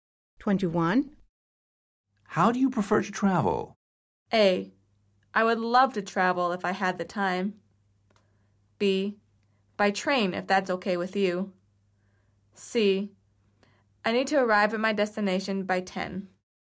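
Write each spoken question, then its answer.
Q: How do you prefer to travel?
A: B: By train, if that's okay with you.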